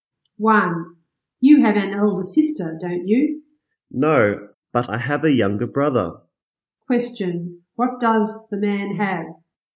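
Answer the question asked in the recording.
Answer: A younger brother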